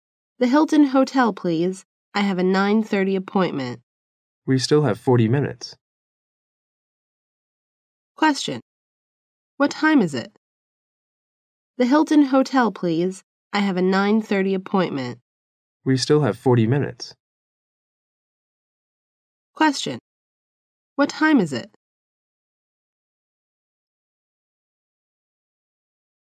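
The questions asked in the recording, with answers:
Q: What time is it?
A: 8:50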